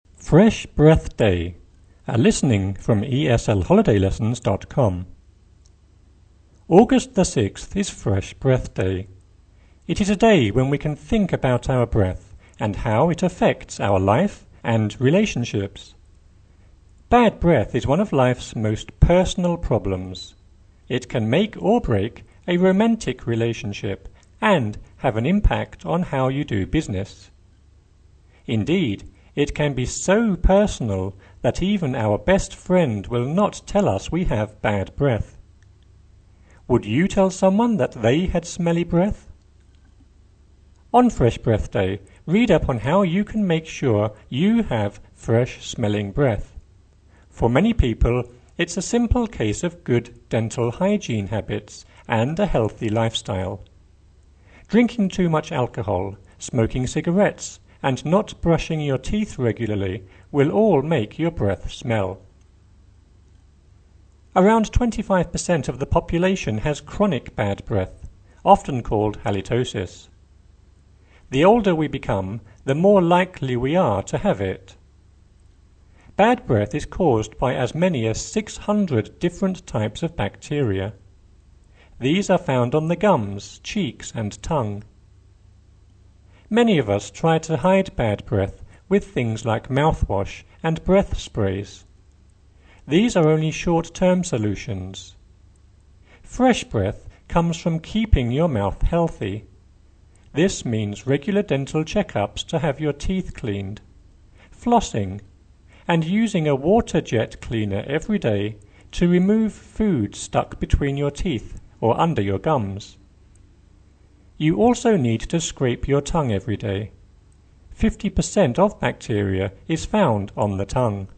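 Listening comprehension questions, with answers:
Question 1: It is a day when we can think about our breath __________________ our life and relationships.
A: and how it affects

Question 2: It can make or break a romantic relationship and __________________ how you do business.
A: have an impact on

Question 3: Indeed, it can be so personal __________________ friend will not tell us we have bad breath.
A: that even our best

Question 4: On Fresh Breath Day, __________________ can make sure you have fresh-smelling breath.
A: read up on how you

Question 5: For many people __________________ good dental hygiene habits and a healthy lifestyle.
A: it's a simple case of

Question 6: Drinking too much alcohol, smoking cigarettes and not brushing your teeth regularly __________________ breath smell.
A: will all make your

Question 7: Around 25 per cent of the population has __________________, often called halitosis.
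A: chronic bad breath

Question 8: Bad breath is caused __________________ 600 different types of bacteria.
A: by as many as

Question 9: Many of __________________ bad breath with things like mouthwash and breath sprays.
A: us try to hide

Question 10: Fresh breath __________________ your mouth healthy.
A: comes from keeping

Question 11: This means regular dental check-ups to have your teeth cleaned, flossing, and using a water-jet cleaner every day __________________ between your teeth or under your gums.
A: to remove food stuck

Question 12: Fifty per cent __________________ on the tongue.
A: of bacteria is found

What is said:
READ
August the 6th is Fresh Breath Day. It is a day when we can think about our breath and how it affects our life and relationships. Bad breath is one of life's most personal problems. It can make or break a romantic relationship and have an impact on how you do business. 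Indeed, it can be so personal that even our best friend will not tell us we have bad breath.
Indeed, it can be so personality / personal that even our best friend will not tell us we have bad breath. Would you tell someone that they had smelly / smell breath? On Fresh Breath Day, read down / up on how you can make sure you have fresh-smelling breath. For many people it's a sample / simple case of good dental hygiene habits and a healthy lifestyle. Drinking too much alcohol, smoking cigarettes and not brushing / brush your teeth regularly will all make your breath smell.
Around 25 per cent of the population has chronic / chronicle bad breath, often called halitosis. The older we become, the more likeable / likely we are to have it. Bad breath is caused by as many as 600 different types / type of bacteria. These are found on the gums, cheeks and tongue. Many of us try to hide bad breath with things like mouthwash and breathe / breath sprays. 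These are only short-term solutions. Fresh breath comes from keeping your mouth health / healthy. This means regular dental check-ups to have your teeth cleaned, flossing, and using a water-jet clean / cleaner every day to remove food stuck / stick between your teeth or under your gums.
day to remove food stuck between your teeth or under your gums. You also need
breath?
to scrape your tongue every day. Fifty per cent of bacteria is found on the tongue.
sprays.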